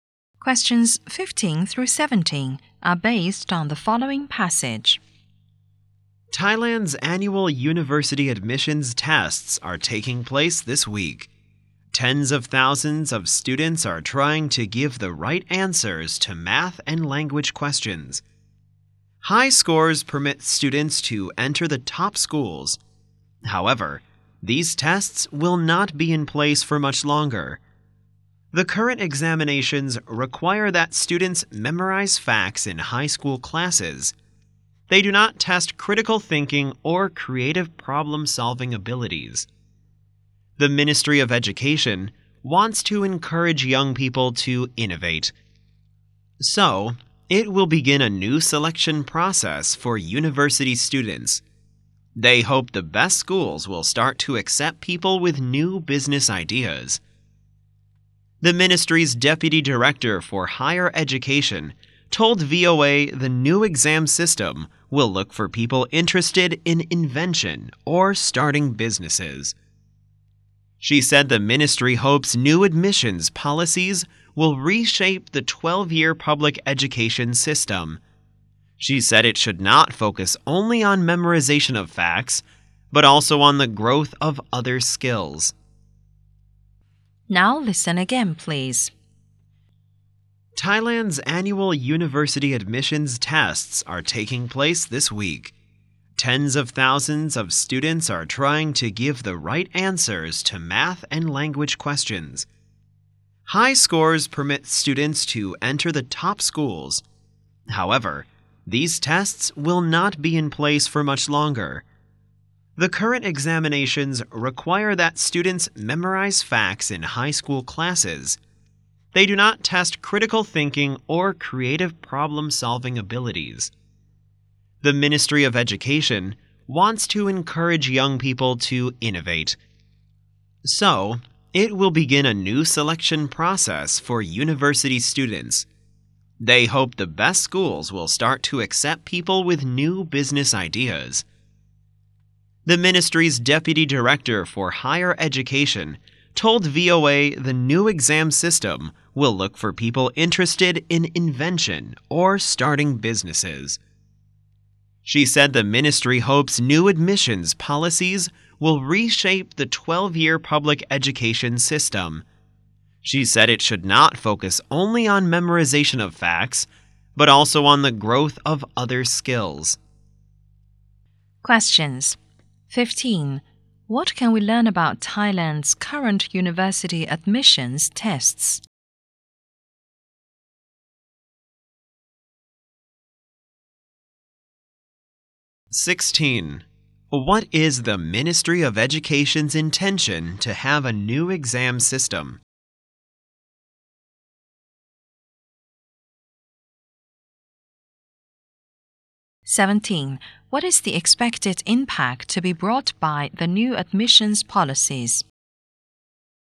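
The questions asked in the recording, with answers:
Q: What can we learn about Thailand's current university admissions tests?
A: They test memorized facts, not critical thinking or creativity

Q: What is the Ministry of Education's intention to have a new exam system?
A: To encourage young people to innovate

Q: What is the expected impact to be brought by the new admissions policies?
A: Reshaping the 12-year public education system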